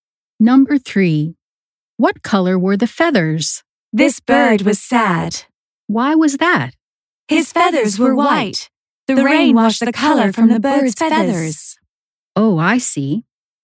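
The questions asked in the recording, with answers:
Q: What color were the feathers?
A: white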